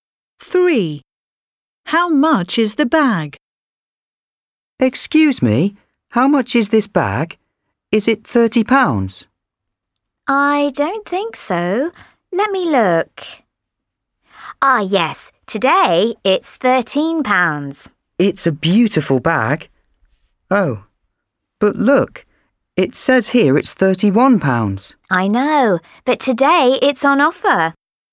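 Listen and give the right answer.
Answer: £13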